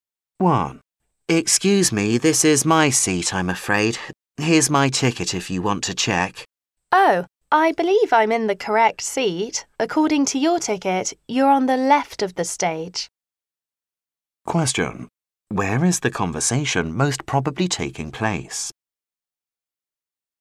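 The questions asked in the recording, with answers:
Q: Where is the conversation most probably taking place?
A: In a theater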